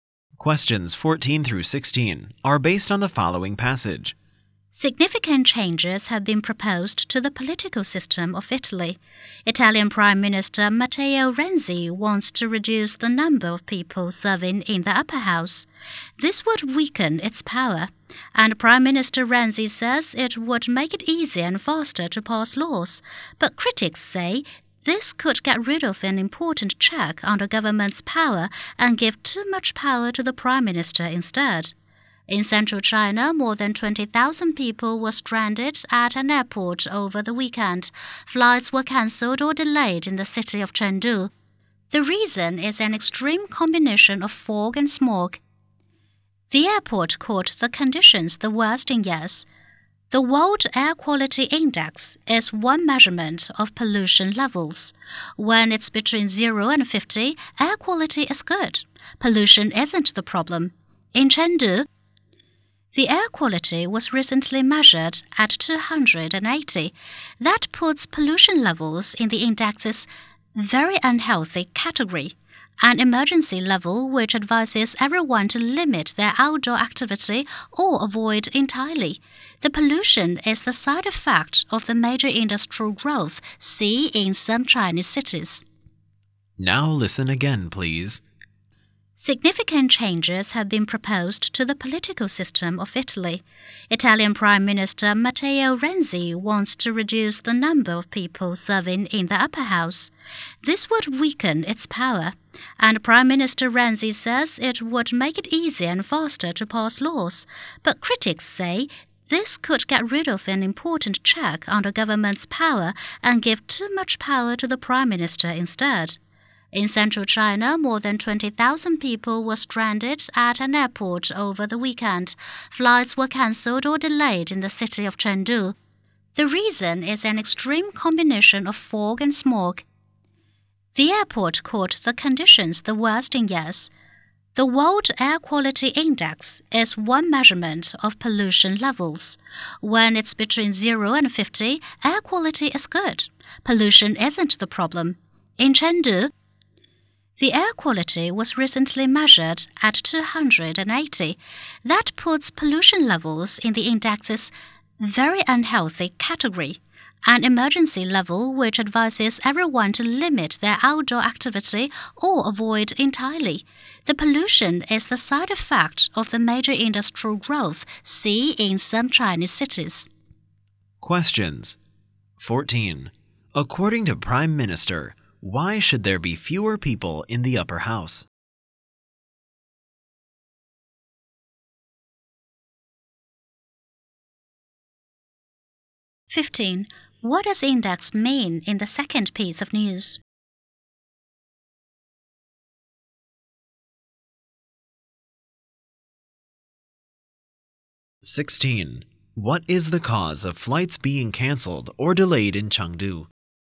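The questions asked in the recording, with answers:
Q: According to Prime Minister, why should there be fewer people in the upper house?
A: To make it easier and faster to pass laws

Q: What is the cause of flights being cancelled or delayed in Chengdu?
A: An extreme combination of fog and smog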